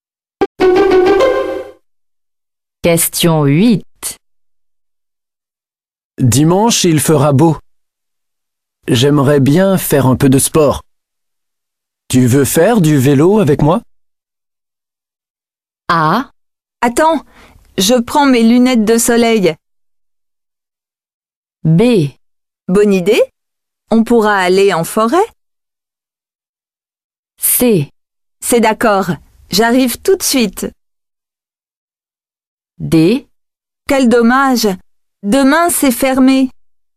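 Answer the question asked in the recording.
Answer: B: Bonne idée, on pourra aller en forêt.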